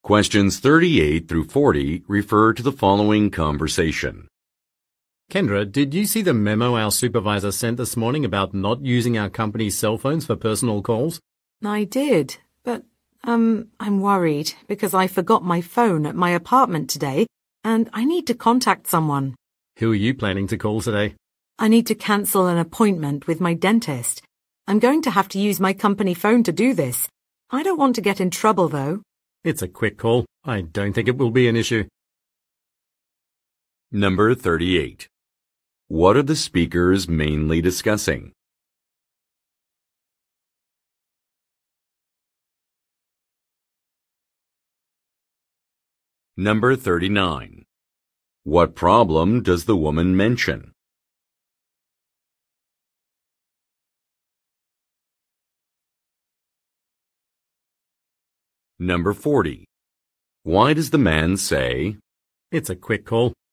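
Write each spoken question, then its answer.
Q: What are the speakers mainly discussing?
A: A memo about not using company cell phones for personal calls

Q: What problem does the woman mention?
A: She forgot her phone at her apartment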